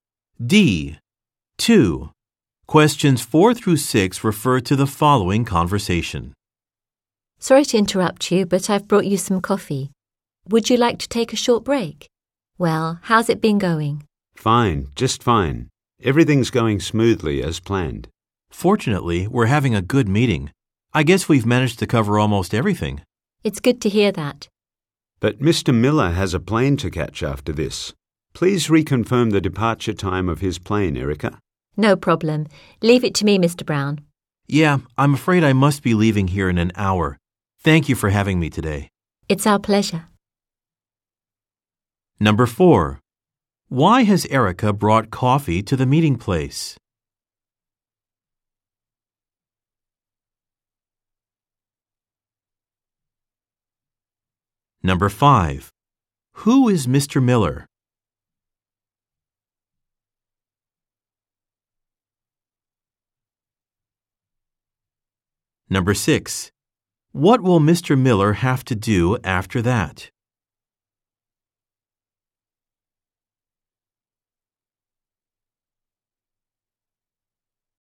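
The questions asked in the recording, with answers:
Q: Why has Erica brought coffee to the meeting place?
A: So they can take a short break

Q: What will Mr. Miller have to do after that?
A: Catch a plane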